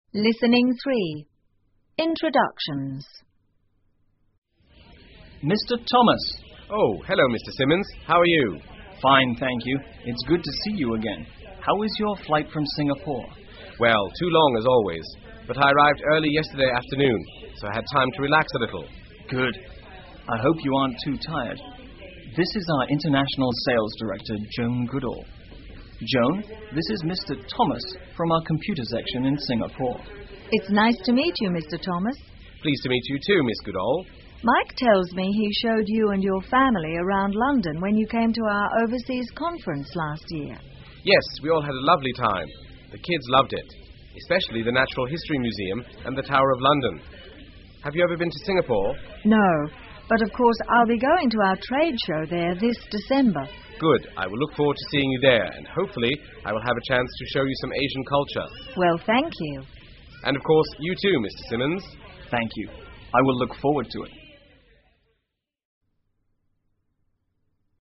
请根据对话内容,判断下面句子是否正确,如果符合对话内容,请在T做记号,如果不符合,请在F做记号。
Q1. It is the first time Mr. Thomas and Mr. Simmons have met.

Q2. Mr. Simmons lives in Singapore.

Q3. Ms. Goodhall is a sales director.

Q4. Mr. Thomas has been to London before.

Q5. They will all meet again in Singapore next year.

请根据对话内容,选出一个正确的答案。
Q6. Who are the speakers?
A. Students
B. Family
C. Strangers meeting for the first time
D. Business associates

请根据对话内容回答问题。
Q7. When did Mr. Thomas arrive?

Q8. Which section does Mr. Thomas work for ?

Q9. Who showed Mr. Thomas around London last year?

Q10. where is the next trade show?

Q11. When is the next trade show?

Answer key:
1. F
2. F
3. T
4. T
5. F
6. D
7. Early yesterday afternoon
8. Computer section
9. Mike
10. In Singapore
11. This December

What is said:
Simmons:Mr Thomas!
Thomas:Oh,hello Mr Simmons.How are you?
S:Fine,thank you.It's good to see you again.How was your flight from Singapore?
T:Well,too long as always.But I arrived early yesterday afternoon,so had time to relax a little.
S:Good.I hope you aren't too tired.This is our International Sales Director,Joan Goodhall.Joan,this is Mr Thomas,from our computer section in Singapore.
Goodhall:It's nice to meet you,Mr Thomas.
T:Pleased to meet you too,Ms Goodhall.
G:Mike tells me he showed you and your family around London when you came to our overseas conference last year.
T:Yes,we all had a lovely time.The kids loved it.Especially the Natural History Museum and the Tower of London.Have you ever been to Singapore?
G:No,but of course,I'll be going to our trade show there this December.
T:Good.I will look forward to seeing you there and hopefully,I will have a chance to show you some Asian culture.
G:Well,thank you.
S:Thank you.I will look forward to it.

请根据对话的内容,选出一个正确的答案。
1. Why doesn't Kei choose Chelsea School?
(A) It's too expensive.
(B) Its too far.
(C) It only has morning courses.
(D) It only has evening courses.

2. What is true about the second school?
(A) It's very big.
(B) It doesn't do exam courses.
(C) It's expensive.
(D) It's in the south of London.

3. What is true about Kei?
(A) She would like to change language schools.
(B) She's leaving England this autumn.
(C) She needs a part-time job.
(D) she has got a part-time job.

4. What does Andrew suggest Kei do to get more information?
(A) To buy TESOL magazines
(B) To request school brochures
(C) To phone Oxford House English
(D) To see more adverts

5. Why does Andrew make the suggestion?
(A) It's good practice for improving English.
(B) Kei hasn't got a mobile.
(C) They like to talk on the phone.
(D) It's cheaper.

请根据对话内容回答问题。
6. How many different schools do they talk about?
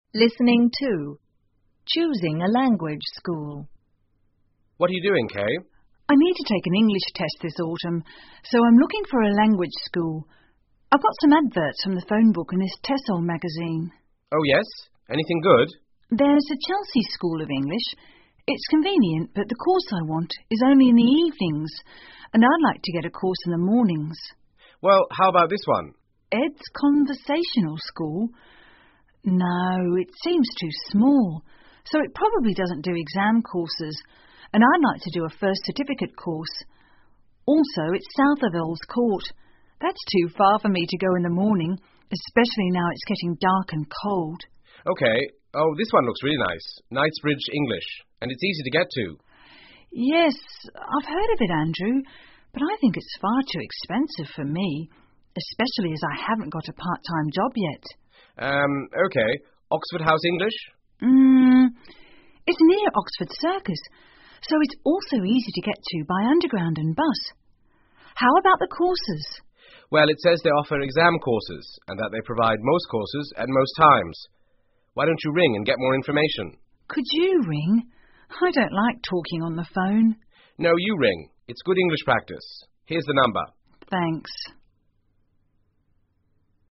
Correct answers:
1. D
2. B
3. C
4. C
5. A
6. Four

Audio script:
Andrew:What are you doing,Kei?
Kei:I need to take an English test this autumn,so I'm looking for a language school.I've got some adverts from the phonebook and this TESOL magazine.
A:Oh,yes?Anything good?
K:There's the Chelsea School of English.It's convenient but the course I what is only in the evenings and I'd like to get a course in the mornings.
A:Well,how about this one?
K:Ed's Conversational School?No,it seems too small,so it probably doesn't do exam courses and I'd like to do a First Certificate Course.Also,It's south of Earls Court.That's too far for me to go in the morning,especially now it's getting dark and cold.
A:OK.Oh,this one looks really nice.Knightbridge English,and it's easy to get to.
K:Yes,I've heard of it,Andrew.But I think it's far too expensive for me,especially as I haven't got a part-time job yet.
A:Urm.OK.Oxford House English?
K:Urm.It's near Oxford Circus,so it's also easy to get to by underground and bus.How about the courses?
A:Well,it says they offer exam courses and that they provide most courses at most times.Why don't you ring and get more information?
K:Could you ring?I don't like talking on the phone.
A:No,you ring.It's good English practice.Here's the number.
K:Thanks.

